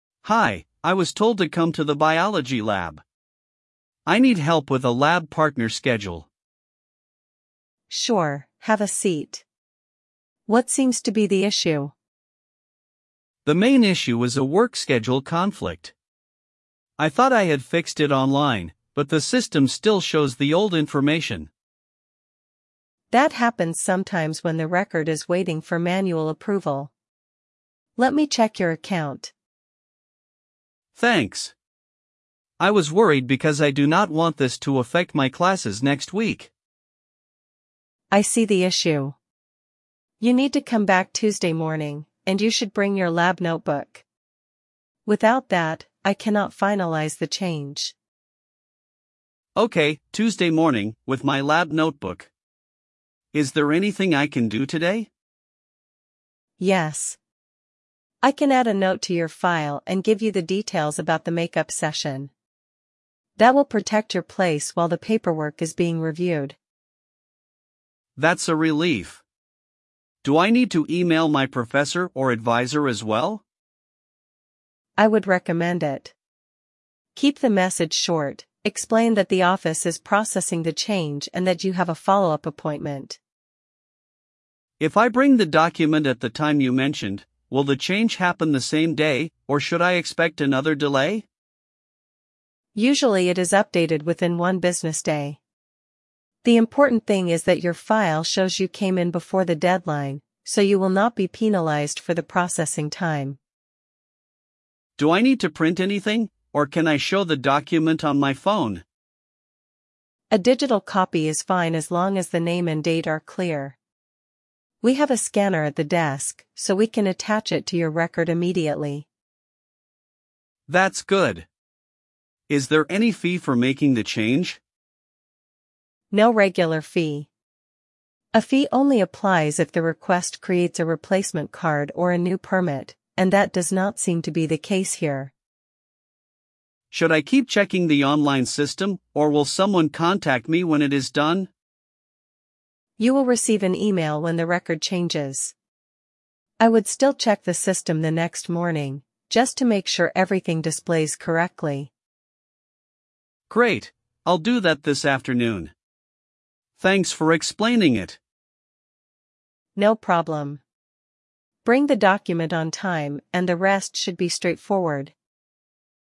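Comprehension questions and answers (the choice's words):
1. Why does the student visit the office?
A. To get help with a lab partner schedule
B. To pay a parking fine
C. To borrow a textbook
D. To attend a lecture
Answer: To get help with a lab partner schedule

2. What is the main issue?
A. A work schedule conflict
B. A lost phone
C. A cancelled concert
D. A broken printer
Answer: A work schedule conflict

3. Why has the online change not gone through?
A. It needs manual approval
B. The student missed the deadline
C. The professor rejected it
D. The office is closed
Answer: It needs manual approval

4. When should the student come back?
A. Tomorrow morning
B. Tuesday morning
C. Next month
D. After graduation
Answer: Tuesday morning

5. What should the student bring?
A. Lab notebook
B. A library book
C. A bus ticket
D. A lab coat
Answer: Lab notebook

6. What will the staff do today?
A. 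Add a note and explain the make-up session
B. Cancel the student's account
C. Call the student's parents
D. Move the exam date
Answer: Add a note and explain the make-up session

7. What does the staff recommend emailing?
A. A short explanation to the professor or advisor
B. A complaint to the dean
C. A refund request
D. A job application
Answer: A short explanation to the professor or advisor

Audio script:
Student: Hi, I was told to come to the biology lab. I need help with a lab partner schedule.
Staff: Sure, have a seat. What seems to be the issue?
Student: The main issue is a work schedule conflict. I thought I had fixed it online, but the system still shows the old information.
Staff: That happens sometimes when the record is waiting for manual approval. Let me check your account.
Student: Thanks. I was worried because I do not want this to affect my classes next week.
Staff: I see the issue. 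You need to come back Tuesday morning, and you should bring your lab notebook. Without that, I cannot finalise the change.
Student: Okay, Tuesday morning, with my lab notebook. Is there anything I can do today?
Staff: Yes. I can add a note to your file and give you the details about the make-up session. That will protect your place while the paperwork is being reviewed.
Student: That's a relief. Do I need to email my professor or advisor as well?
Staff: I would recommend it. Keep the message short: explain that the office is processing the change and that you have a follow-up appointment.
Student: If I bring the document at the time you mentioned, will the change happen the same day, or should I expect another delay?
Staff: Usually it is updated within one business day. The important thing is that your file shows you came in before the deadline, so you will not be penalised for the processing time.
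Student: Do I need to print anything, or can I show the document on my phone?
Staff: A digital copy is fine as long as the name and date are clear. We have a scanner at the desk, so we can attach it to your record immediately.
Student: That's good. Is there any fee for making the change?
Staff: No regular fee. A fee only applies if the request creates a replacement card or a new permit, and that does not seem to be the case here.
Student: Should I keep checking the online system, or will someone contact me when it is done?
Staff: You will receive an email when the record changes. I would still check the system the next morning, just to make sure everything displays correctly.
Student: Great, I'll do that this afternoon. Thanks for explaining it.
Staff: No problem. Bring the document on time, and the rest should be straightforward.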